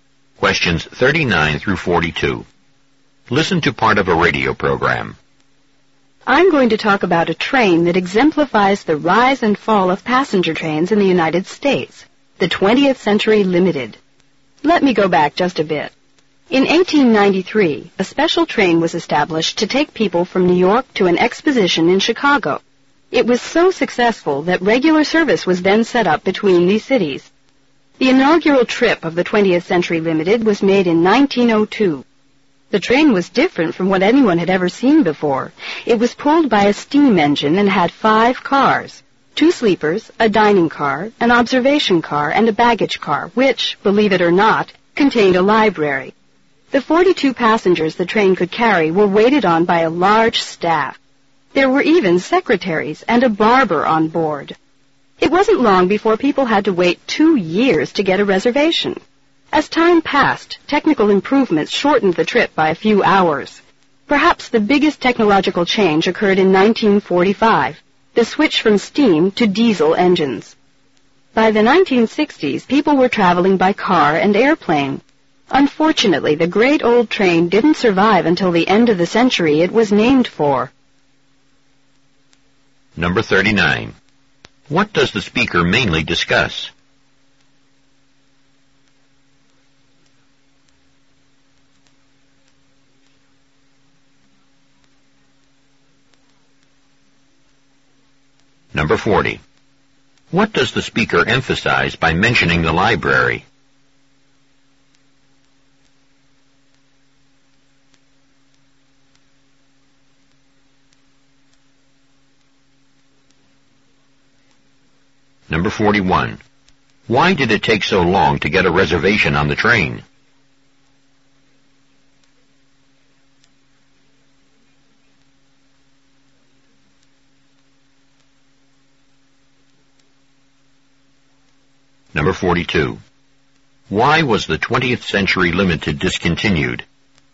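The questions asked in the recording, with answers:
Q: What does the speaker mainly discuss?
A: The history of the 20th Century Limited passenger train

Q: Why was the 20th Century Limited discontinued?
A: People began traveling by car and airplane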